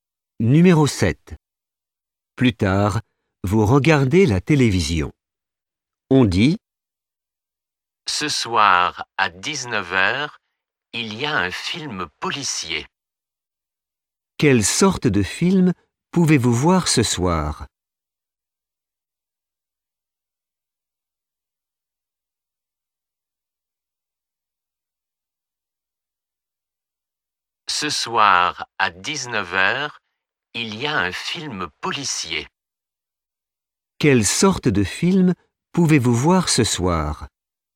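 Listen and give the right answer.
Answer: un film policier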